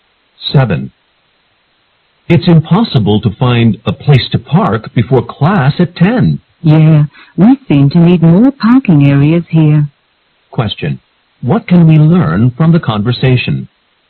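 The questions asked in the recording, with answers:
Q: What can we learn from the conversation?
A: It is hard to find a parking place; more parking areas are needed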